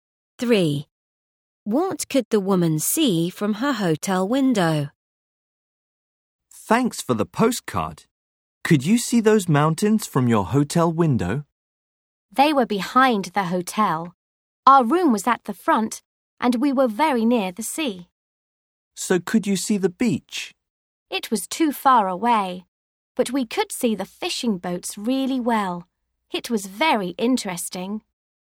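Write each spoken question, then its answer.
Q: What could the woman see from her hotel window?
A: The fishing boats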